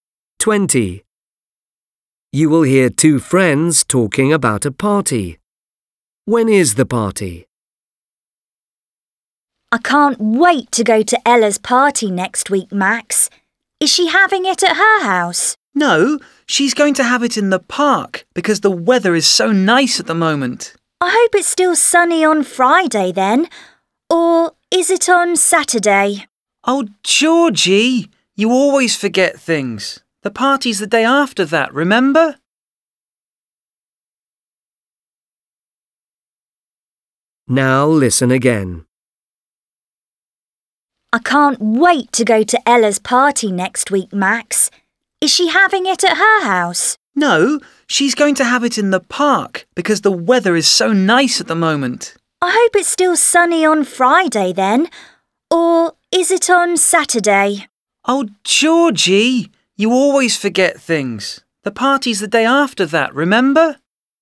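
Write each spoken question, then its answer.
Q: When is the party?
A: on Sunday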